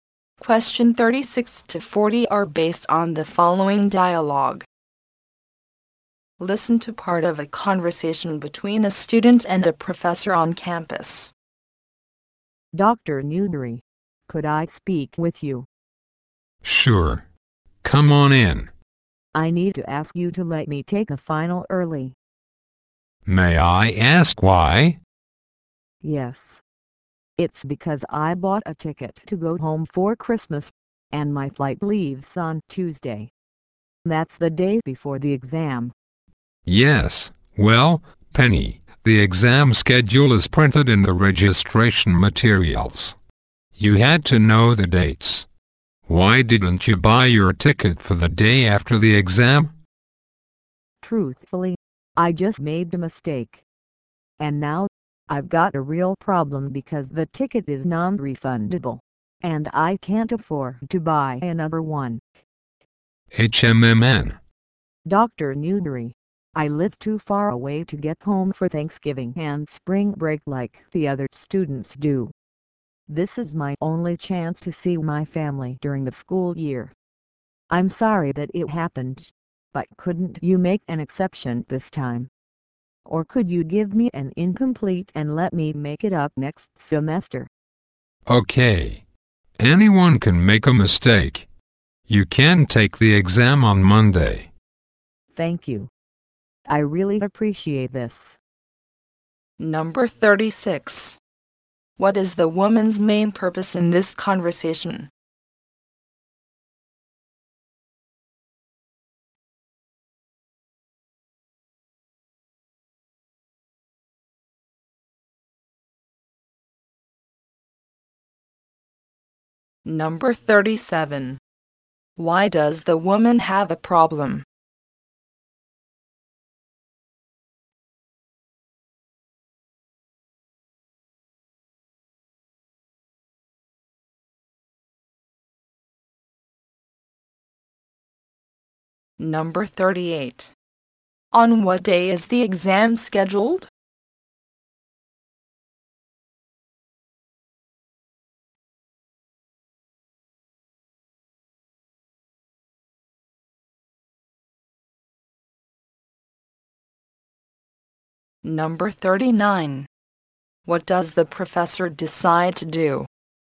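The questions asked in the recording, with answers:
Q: Why does the woman have a problem?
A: Her non-refundable flight home leaves the day before the exam

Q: On what day is the exam scheduled?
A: Wednesday

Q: What does the professor decide to do?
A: Let her take the exam early, on Monday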